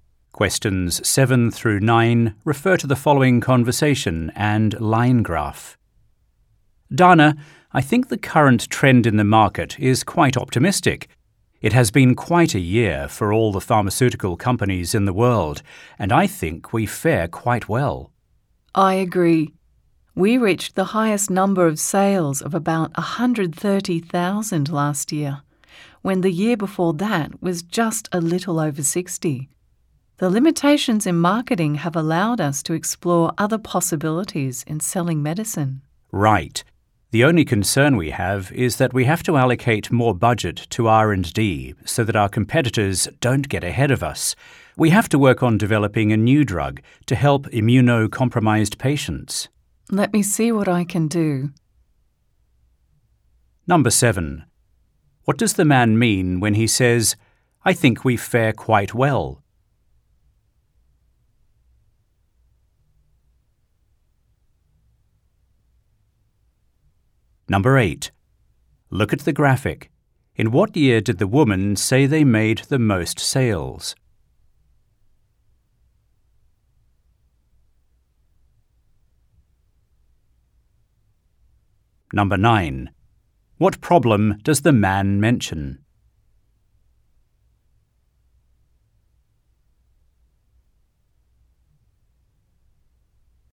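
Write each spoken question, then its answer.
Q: What does the man mean when he says, "I think we fare quite well"?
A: The company has done well this year

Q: What problem does the man mention?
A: They need to allocate more budget to R&D so competitors don't get ahead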